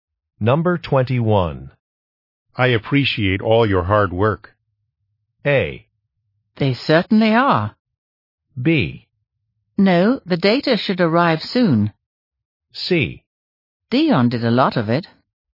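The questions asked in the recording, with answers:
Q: I appreciate all your hard work.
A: C: Dion did a lot of it.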